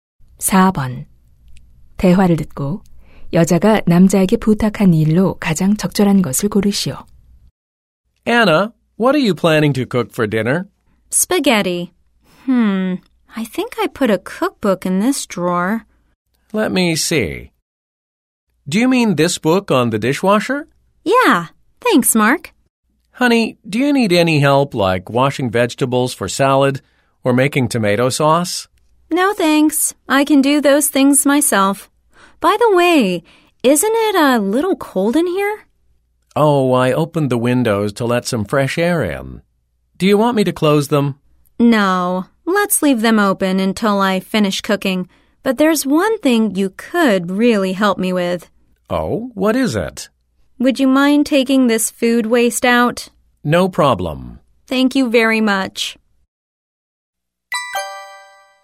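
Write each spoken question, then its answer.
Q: 대화를 듣고 여자가 남자에게 부탁한 일로 가장 적절한 것을 고르시오.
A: 음식물 쓰레기 버리기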